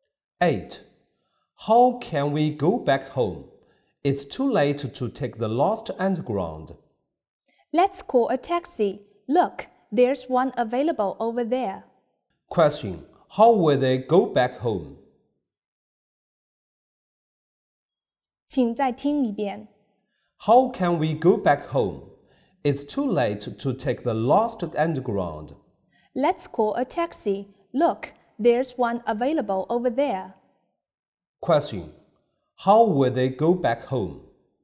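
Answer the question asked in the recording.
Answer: By taxi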